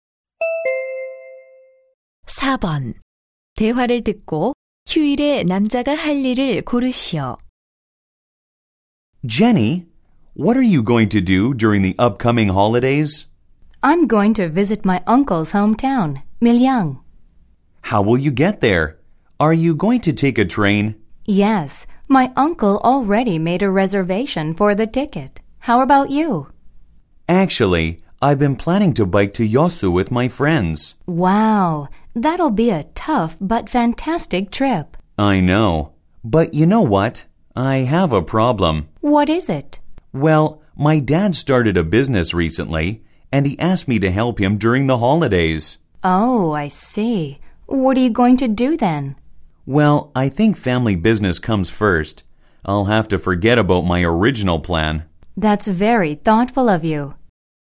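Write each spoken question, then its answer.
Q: 대화를 듣고 휴일에 남자가 할 일을 고르시오.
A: 아버지의 사업 돕기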